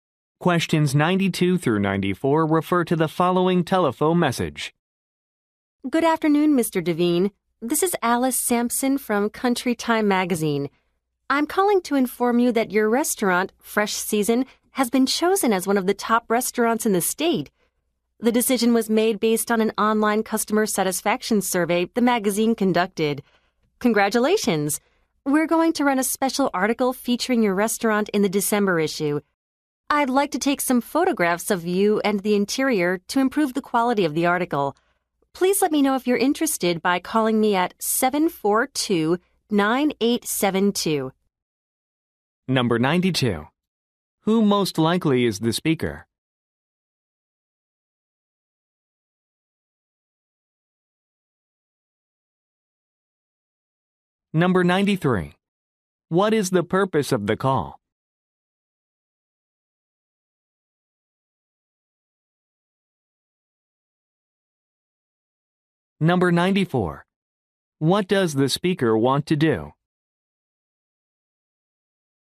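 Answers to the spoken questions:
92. A magazine employee
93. To say his restaurant was chosen as a top restaurant
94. Take photographs of him and the restaurant interior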